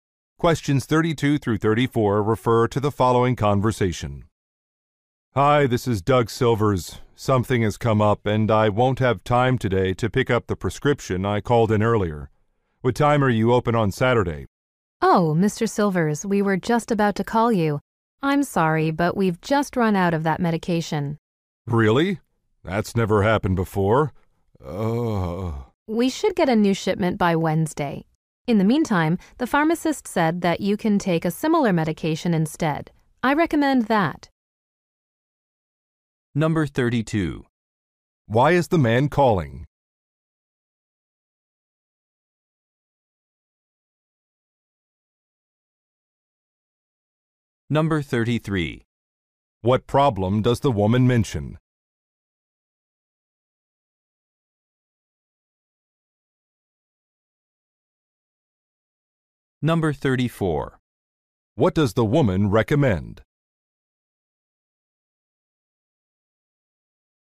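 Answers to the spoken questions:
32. To ask about the store's Saturday hours because he can't pick up his prescription today
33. The medication is out of stock
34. Taking a similar medication instead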